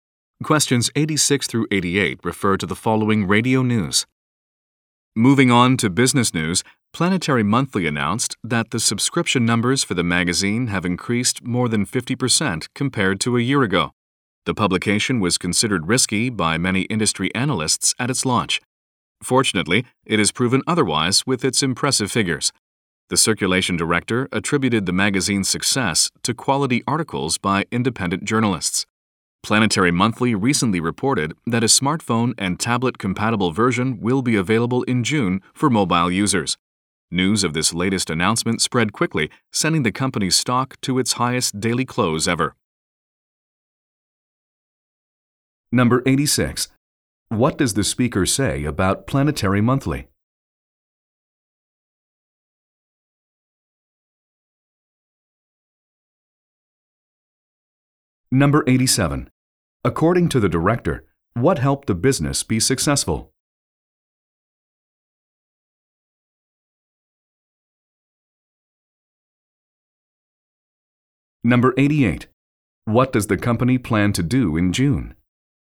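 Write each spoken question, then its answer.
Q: What does the speaker say about Planetary Monthly?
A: Its subscriptions have increased more than 50% from a year ago

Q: According to the director, what helped the business be successful?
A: Quality articles by independent journalists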